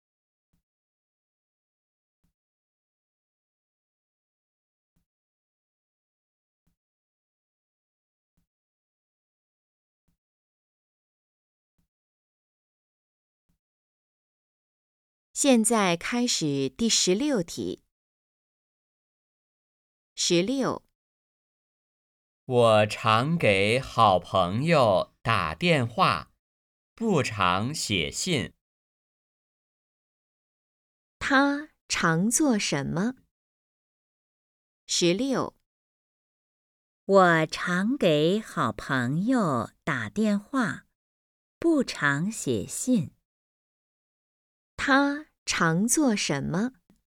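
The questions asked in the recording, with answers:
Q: 他常做什么?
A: 给好朋友打电话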